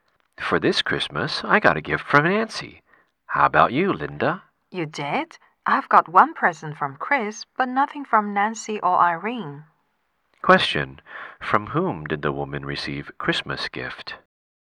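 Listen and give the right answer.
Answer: Chris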